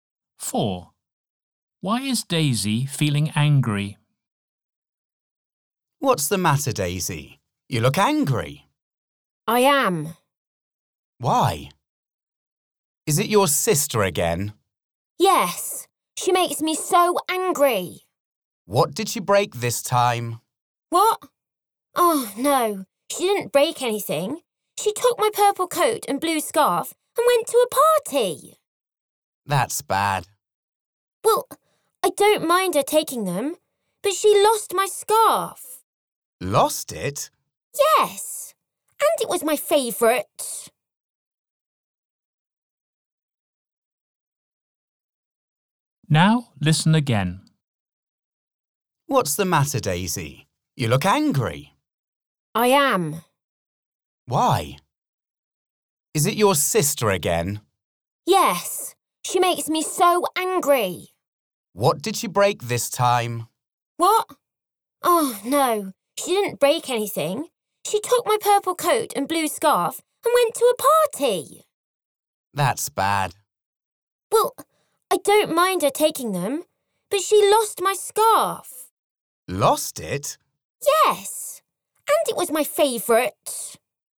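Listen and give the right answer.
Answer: Her sister lost her favourite scarf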